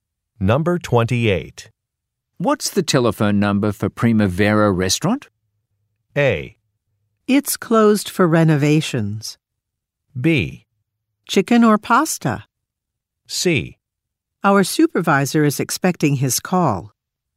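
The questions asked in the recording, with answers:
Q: What's the telephone number for Primavera Restaurant?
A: A: It's closed for renovations.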